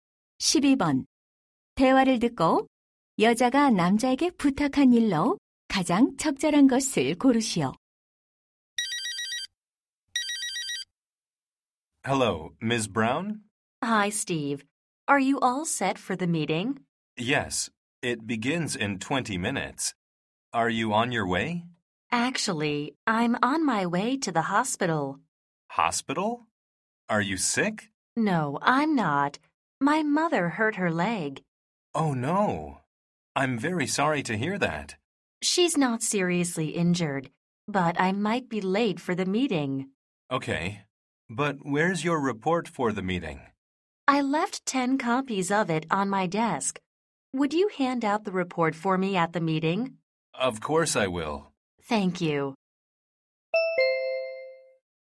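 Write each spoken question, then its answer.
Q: 대화를 듣고 여자가 남자에게 부탁한 일로 가장 적절한 것을 고르시오.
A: 회의에서 보고서 나눠 주기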